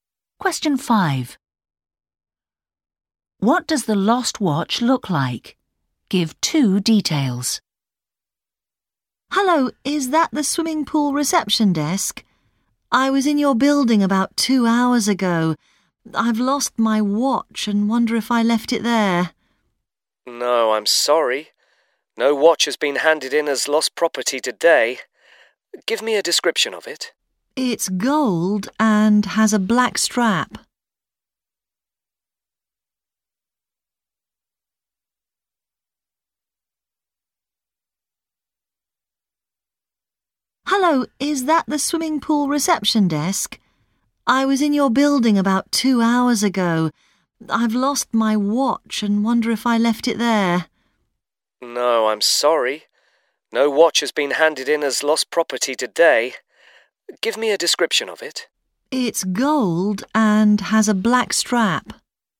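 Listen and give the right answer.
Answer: Gold with a black strap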